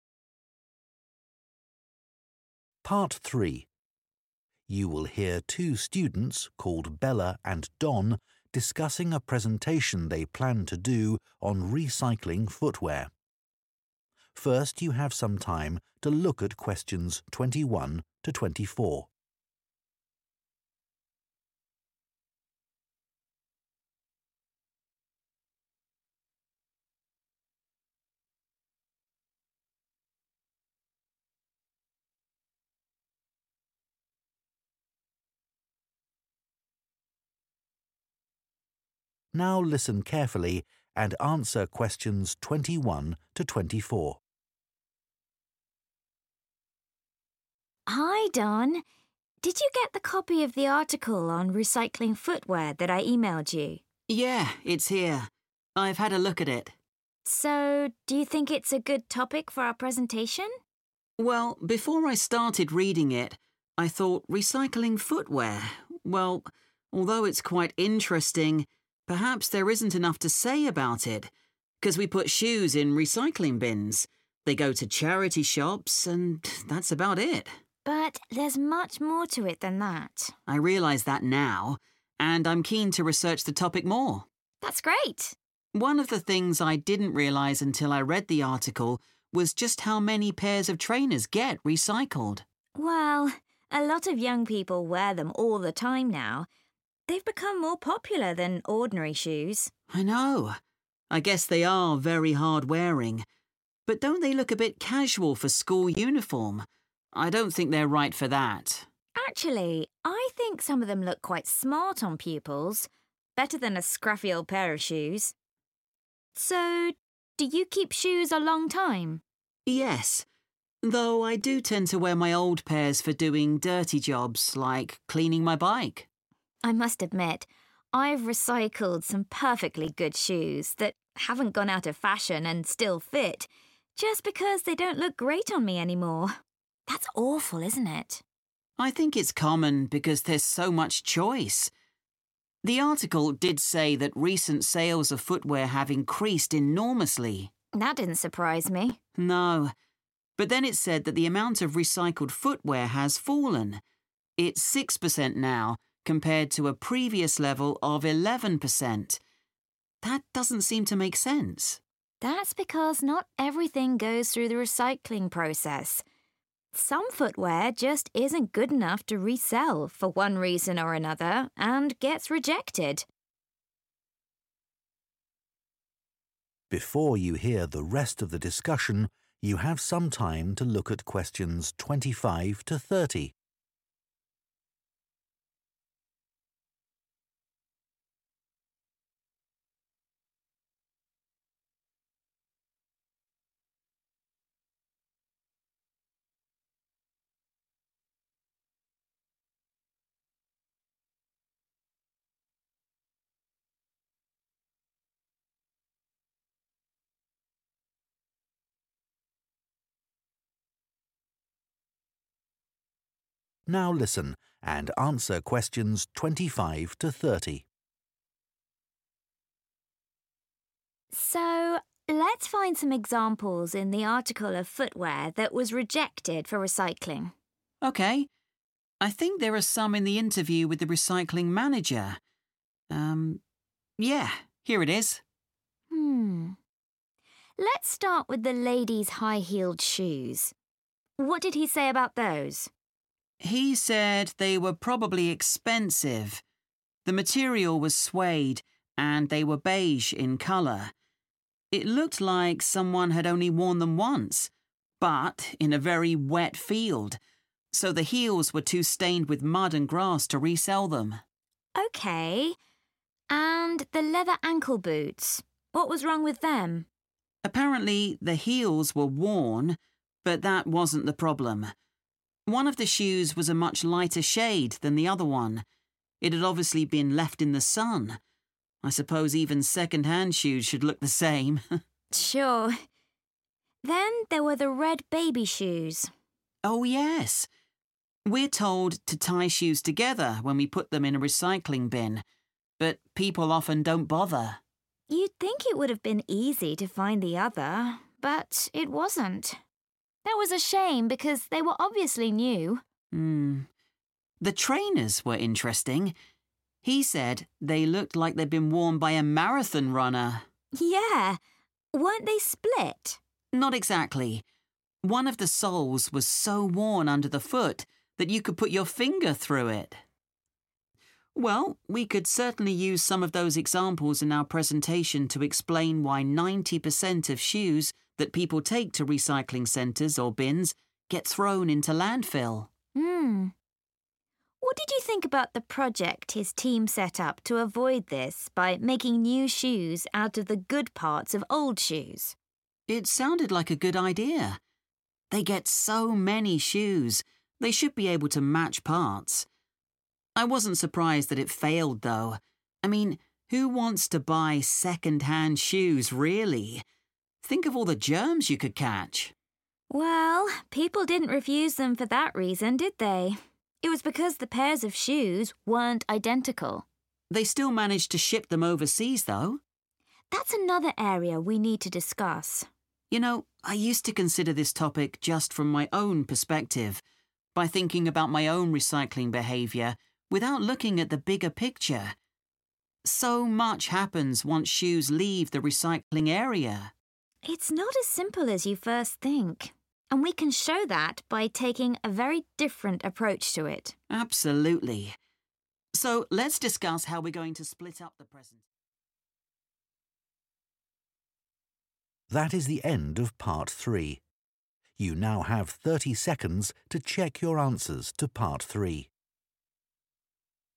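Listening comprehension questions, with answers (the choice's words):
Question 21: At first, Don thought the topic of recycling footwear might be too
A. limited in scope.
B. hard to research.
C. boring for listeners.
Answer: limited in scope.

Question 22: When discussing trainers, Bella and Don disagree about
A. how popular they are among young people.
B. how suitable they are for school.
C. how quickly they wear out.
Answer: how suitable they are for school.

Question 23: Bella says that she sometimes recycles shoes because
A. they no longer fit.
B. she no longer likes them.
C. they are no longer in fashion.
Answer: she no longer likes them.

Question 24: What did the article say that confused Don?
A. Public consumption of footwear has risen.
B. Less footwear is recycled now than in the past.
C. People dispose of more footwear than they used to.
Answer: Less footwear is recycled now than in the past.

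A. one shoe was missing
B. the colour of one shoe had faded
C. one shoe had a hole in it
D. the shoes were brand new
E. the shoes were too dirty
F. the stitching on the shoes was broken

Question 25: the high-heeled shoes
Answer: the shoes were too dirty

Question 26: the ankle boots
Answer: the colour of one shoe had faded

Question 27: the baby shoes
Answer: one shoe was missing

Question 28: the trainers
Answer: one shoe had a hole in it

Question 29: Why did the project to make 'new' shoes out of old shoes fail?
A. People believed the 'new' pairs of shoes were unhygienic.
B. There were not enough good parts to use in the old shoes.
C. The shoes in the 'new' pairs were not completely alike.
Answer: The shoes in the 'new' pairs were not completely alike.

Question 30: Bella and Don agree that they can present their topic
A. from a new angle.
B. with relevant images.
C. in a straightforward way.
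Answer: from a new angle.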